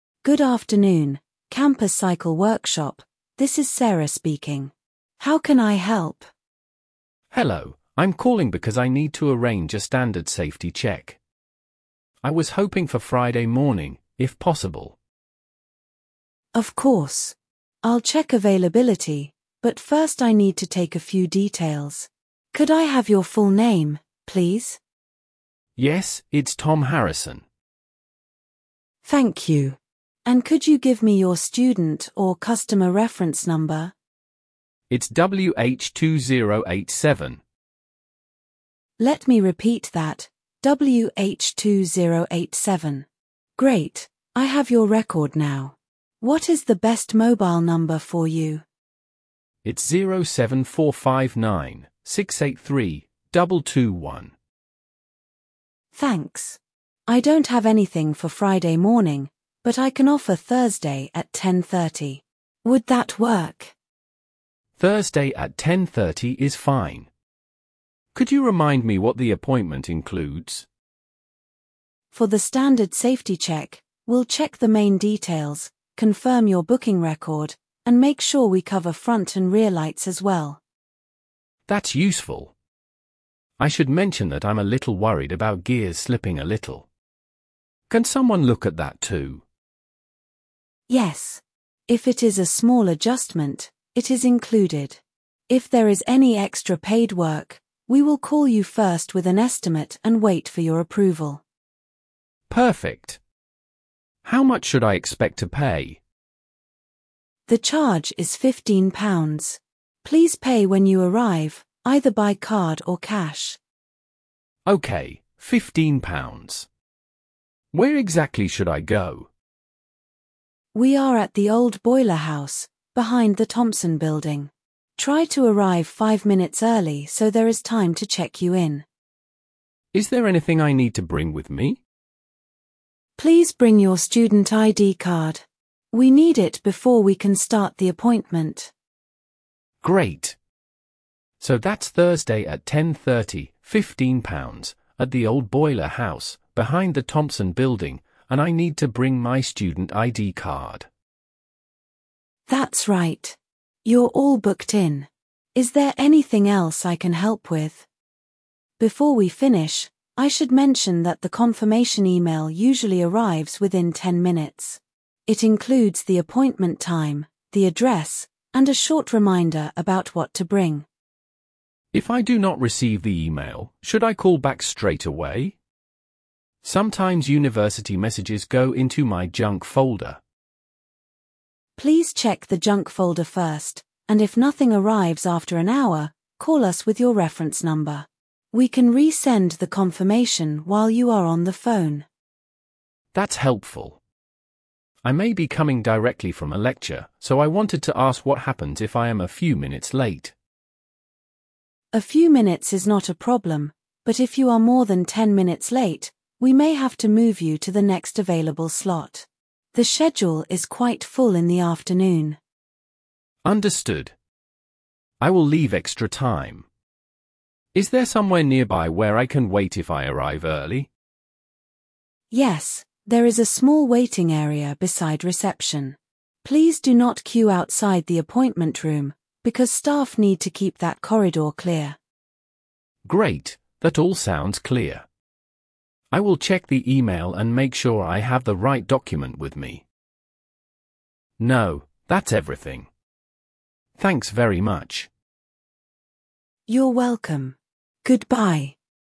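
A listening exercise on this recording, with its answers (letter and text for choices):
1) What service does the caller want to arrange?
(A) A refund request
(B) Standard safety check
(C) A lecture ticket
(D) A library renewal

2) Which day is the appointment booked for?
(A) Monday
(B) Thursday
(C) Saturday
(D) Sunday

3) What time is the appointment?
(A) Nine fifteen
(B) ten thirty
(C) Two o'clock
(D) Six forty-five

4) How much will the caller pay?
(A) Free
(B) Ten pounds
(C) Fifteen pounds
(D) One hundred pounds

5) Where should the caller go?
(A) The old boiler house, behind the thompson building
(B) The main library entrance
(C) Room twenty on the top floor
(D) The city bus station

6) What must the caller bring?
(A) A printed map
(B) Student id card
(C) A passport photo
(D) A bank statement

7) What will happen if extra paid work is needed?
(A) It will be done automatically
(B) The booking will be cancelled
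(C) The caller will be contacted first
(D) The fee will be doubled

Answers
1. (B) Standard safety check
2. (B) Thursday
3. (B) ten thirty
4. (C) Fifteen pounds
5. (A) The old boiler house, behind the thompson building
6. (B) Student id card
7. (C) The caller will be contacted first

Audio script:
Staff: Good afternoon, Campus Cycle Workshop, this is Sarah speaking. How can I help?
Student: Hello, I'm calling because I need to arrange a standard safety check. I was hoping for Friday morning, if possible.
Staff: Of course. I'll check availability, but first I need to take a few details. Could I have your full name, please?
Student: Yes, it's Tom Harrison.
Staff: Thank you. And could you give me your student or customer reference number?
Great, I have your record now. What is the best mobile number for you?
Staff: Thanks. I don't have anything for Friday morning, but I can offer Thursday at ten thirty. 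Would that work?
Student: Thursday at ten thirty is fine. Could you remind me what the appointment includes?
Staff: For the standard safety check, we'll check the main details, confirm your booking record, and make sure we cover front and rear lights as well.
Student: That's useful. I should mention that I'm a little worried about gears slipping a little. Can someone look at that too?
Staff: Yes. If it is a small adjustment, it is included. If there is any extra paid work, we will call you first with an estimate and wait for your approval.
Student: Perfect. How much should I expect to pay?
Staff: The charge is fifteen pounds. Please pay when you arrive, either by card or cash.
Student: Okay, fifteen pounds. Where exactly should I go?
Staff: We are at the old boiler house, behind the Thompson Building. Try to arrive five minutes early so there is time to check you in.
Student: Is there anything I need to bring with me?
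So that's Thursday at ten thirty, fifteen pounds, at the old boiler house, behind the Thompson Building, and I need to bring my student ID card.
Staff: That's right. You're all booked in. Is there anything else I can help with?
Staff: Before we finish, I should mention that the confirmation email usually arrives within ten minutes. It includes the appointment time, the address, and a short reminder about what to bring.
Student: If I do not receive the email, should I call back straight away? Sometimes university messages go into my junk folder.
Staff: Please check the junk folder first, and if nothing arrives after an hour, call us with your reference number. We can resend the confirmation while you are on the phone.
Student: That's helpful. I may be coming directly from a lecture, so I wanted to ask what happens if I am a few minutes late.
Staff: A few minutes is not a problem, but if you are more than ten minutes late, we may have to move you to the next available slot. 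The schedule is quite full in the afternoon.
Student: Understood. I will leave extra time. Is there somewhere nearby where I can wait if I arrive early?
Staff: Yes, there is a small waiting area beside reception. Please do not queue outside the appointment room, because staff need to keep that corridor clear.
Student: Great, that all sounds clear. I will check the email and make sure I have the right document with me.
Student: No, that's everything. Thanks very much.
Staff: You're welcome. Goodbye.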